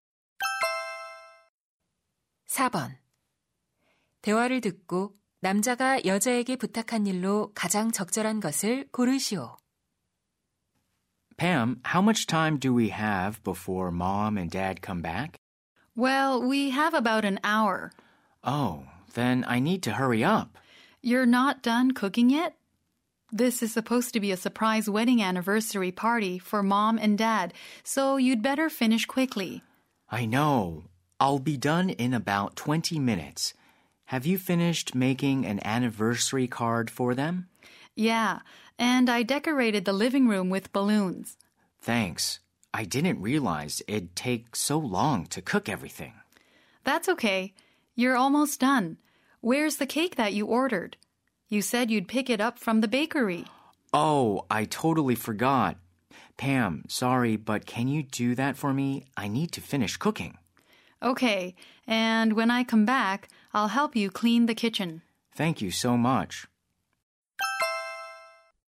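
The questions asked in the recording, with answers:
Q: 대화를 듣고 남자가 여자에게 부탁한 일로 가장 적절한 것을 고르시오.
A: 빵집에서 케이크 찾아오기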